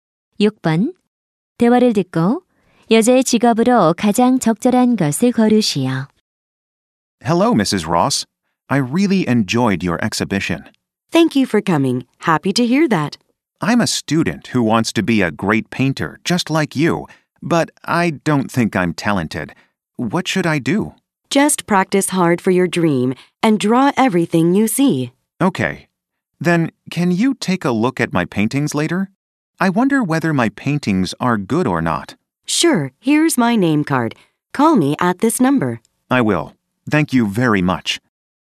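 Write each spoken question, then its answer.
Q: 대화를 듣고 여자의 직업으로 가장 적절한 것을 고르시오.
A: 화가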